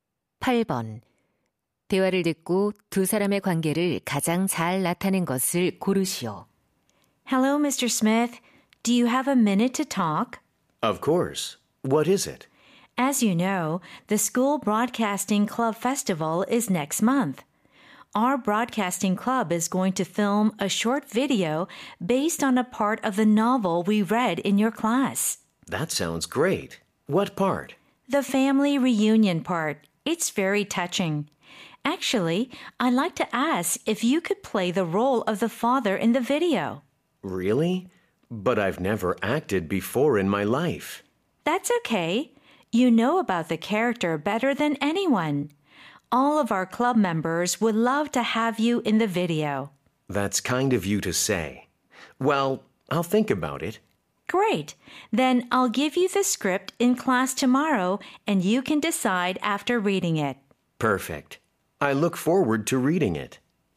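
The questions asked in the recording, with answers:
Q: 대화를 듣고 두 사람의 관계를 가장 잘 나타낸 것을 고르시오.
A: 학생 - 교사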